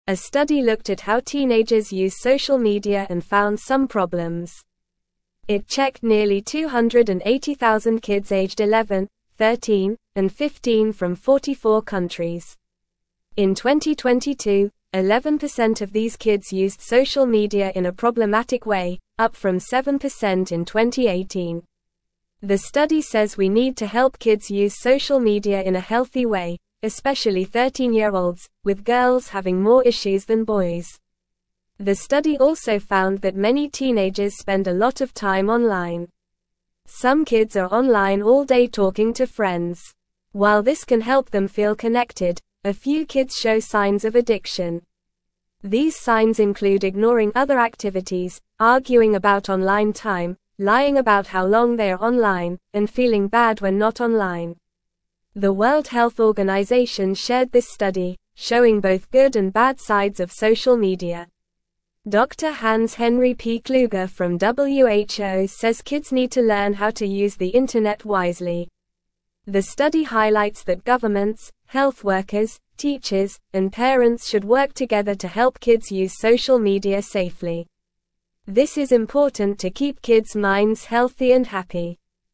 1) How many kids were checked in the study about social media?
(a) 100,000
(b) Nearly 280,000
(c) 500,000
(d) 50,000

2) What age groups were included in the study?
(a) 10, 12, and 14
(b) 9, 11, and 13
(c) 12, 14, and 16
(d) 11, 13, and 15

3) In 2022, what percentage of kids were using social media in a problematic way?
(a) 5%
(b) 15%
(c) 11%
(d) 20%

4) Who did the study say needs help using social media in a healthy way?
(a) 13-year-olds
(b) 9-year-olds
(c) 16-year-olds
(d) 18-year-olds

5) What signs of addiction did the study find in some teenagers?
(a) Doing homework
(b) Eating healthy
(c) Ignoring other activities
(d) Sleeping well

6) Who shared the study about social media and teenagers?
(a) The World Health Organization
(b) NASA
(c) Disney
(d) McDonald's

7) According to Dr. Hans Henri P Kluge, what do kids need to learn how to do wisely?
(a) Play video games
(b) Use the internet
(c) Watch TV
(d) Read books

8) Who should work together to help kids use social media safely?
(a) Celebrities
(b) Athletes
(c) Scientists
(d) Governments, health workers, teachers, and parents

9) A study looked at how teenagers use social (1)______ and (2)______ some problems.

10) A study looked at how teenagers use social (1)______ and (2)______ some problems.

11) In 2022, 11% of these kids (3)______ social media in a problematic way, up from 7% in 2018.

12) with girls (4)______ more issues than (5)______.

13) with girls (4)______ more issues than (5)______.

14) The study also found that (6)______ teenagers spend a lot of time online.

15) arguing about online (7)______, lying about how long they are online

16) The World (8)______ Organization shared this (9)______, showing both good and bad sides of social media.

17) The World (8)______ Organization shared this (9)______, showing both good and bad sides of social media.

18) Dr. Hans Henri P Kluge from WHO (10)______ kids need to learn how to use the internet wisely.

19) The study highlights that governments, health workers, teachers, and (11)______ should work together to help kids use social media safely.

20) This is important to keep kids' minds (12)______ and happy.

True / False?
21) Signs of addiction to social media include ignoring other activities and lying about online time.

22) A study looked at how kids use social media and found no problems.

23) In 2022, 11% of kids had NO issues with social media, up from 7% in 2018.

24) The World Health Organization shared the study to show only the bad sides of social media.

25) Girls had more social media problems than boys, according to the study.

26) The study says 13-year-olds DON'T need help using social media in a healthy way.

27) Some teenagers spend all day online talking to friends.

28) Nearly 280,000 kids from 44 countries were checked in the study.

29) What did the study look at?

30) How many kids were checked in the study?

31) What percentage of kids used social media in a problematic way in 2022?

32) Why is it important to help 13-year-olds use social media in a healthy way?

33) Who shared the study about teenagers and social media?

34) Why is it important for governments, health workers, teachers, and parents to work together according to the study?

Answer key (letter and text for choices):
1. (b) Nearly 280,000
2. (d) 11, 13, and 15
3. (c) 11%
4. (a) 13-year-olds
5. (c) Ignoring other activities
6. (a) The World Health Organization
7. (b) Use the internet
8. (d) Governments, health workers, teachers, and parents
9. media
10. found
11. used
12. having
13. boys
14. many
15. time
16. Health
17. study
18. says
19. parents
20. healthy
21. True
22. False
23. False
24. False
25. True
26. False
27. True
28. True
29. The study looked at how teenagers use social media.
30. Nearly 280,000 kids aged 11, 13, and 15 from 44 countries
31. In 2022, 11% of kids used social media in a problematic way.
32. they have more issues with social media, especially girls.
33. The World Health Organization (WHO)
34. to help kids use social media safely and keep their minds healthy and happy

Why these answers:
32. It's important to help 13-year-olds because they have more issues with social media, especially girls.
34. It's important for them to work together to help kids use social media safely and keep their minds healthy and happy.

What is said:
A study looked at how teenagers use social media and found some problems. It checked nearly 280,000 kids aged 11, 13, and 15 from 44 countries. In 2022, 11% of these kids used social media in a problematic way, up from 7% in 2018. The study says we need to help kids use social media in a healthy way, especially 13-year-olds, with girls having more issues than boys.
The study also found that many teenagers spend a lot of time online. Some kids are online all day talking to friends. While this can help them feel connected, a few kids show signs of addiction. These signs include ignoring other activities, arguing about online time, lying about how long they are online, and feeling bad when not online.
The World Health Organization shared this study, showing both good and bad sides of social media. Dr. Hans Henri P Kluge from WHO says kids need to learn how to use the internet wisely. The study highlights that governments, health workers, teachers, and parents should work together to help kids use social media safely. This is important to keep kids' minds healthy and happy.

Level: Level 2